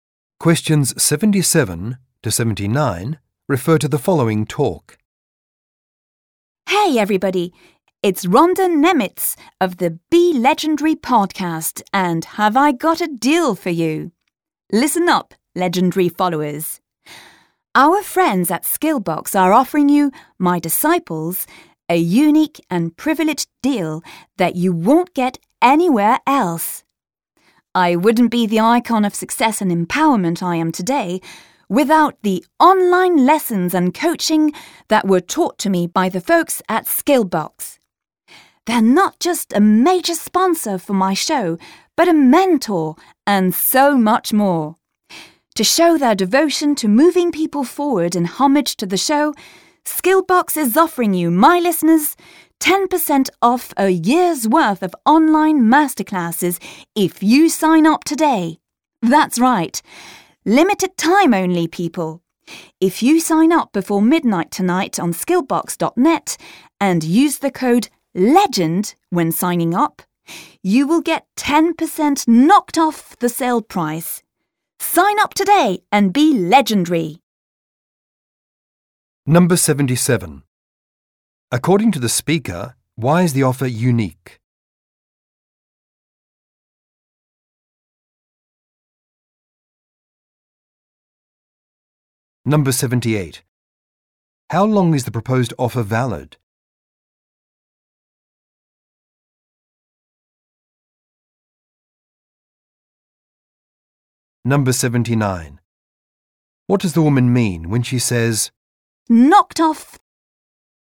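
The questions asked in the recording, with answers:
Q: According to the speaker, why is the offer unique?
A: It is only available to the podcast's listeners

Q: How long is the proposed offer valid?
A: Until midnight tonight

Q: What does the woman mean when she says,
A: Deducted from the price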